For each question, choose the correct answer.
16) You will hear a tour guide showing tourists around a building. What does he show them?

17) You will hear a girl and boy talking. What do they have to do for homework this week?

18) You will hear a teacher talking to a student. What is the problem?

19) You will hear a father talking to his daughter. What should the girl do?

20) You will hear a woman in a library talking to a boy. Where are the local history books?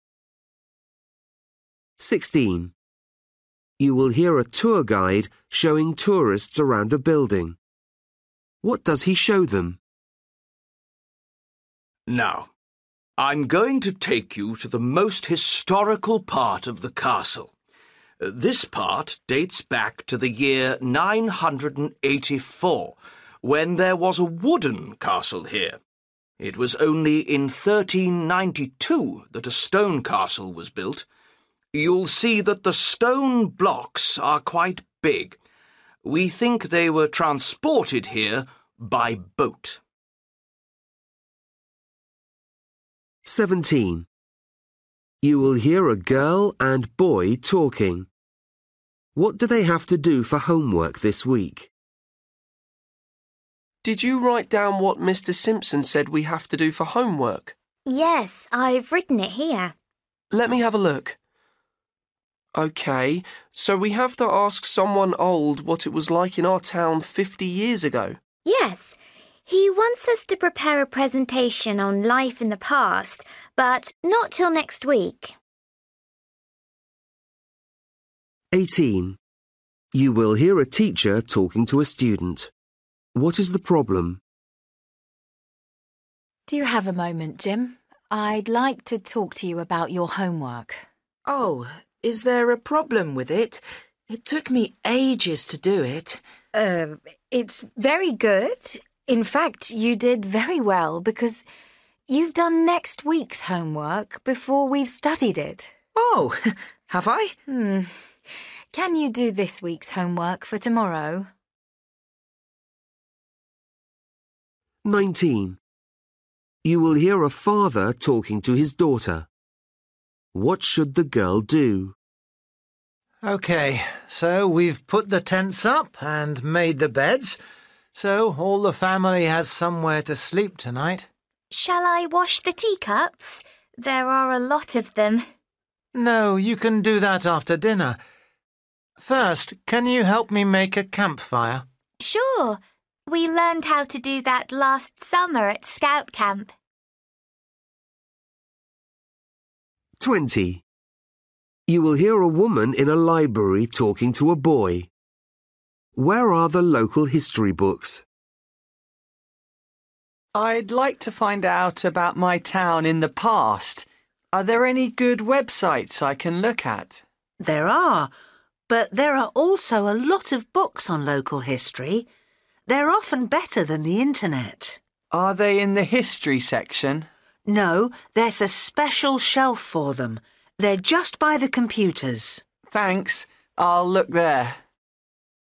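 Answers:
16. the oldest part of the castle, with its big stone blocks
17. ask an old person what their town was like 50 years ago
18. he did next week's homework instead of this week's
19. help make a campfire
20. on a special shelf by the computers

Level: Luyện nghe trình độ A2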